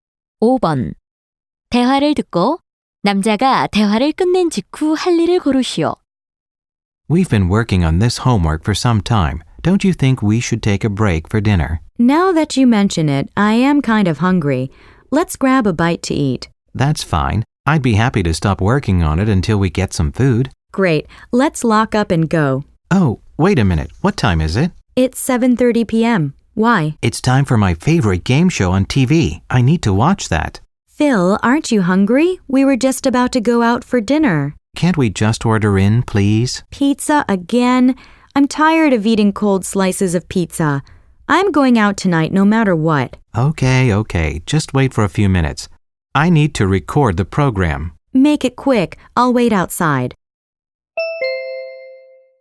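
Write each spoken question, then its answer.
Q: 대화를 듣고 남자가 대화를 끝낸 직후 할 일을 고르시오.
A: TV 프로그램 녹화하기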